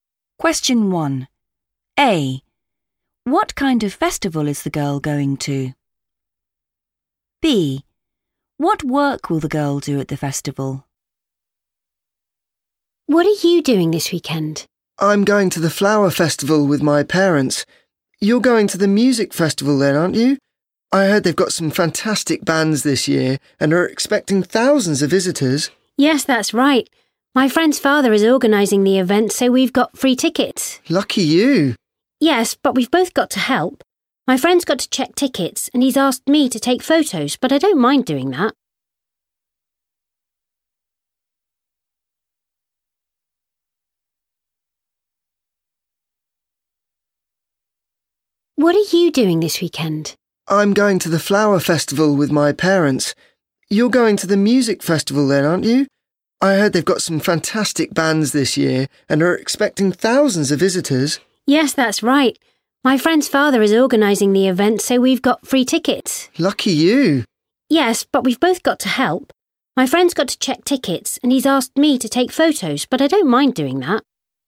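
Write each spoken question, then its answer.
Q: What kind of festival is the girl going to?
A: music festival

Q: What work will the girl do at the festival?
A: take photos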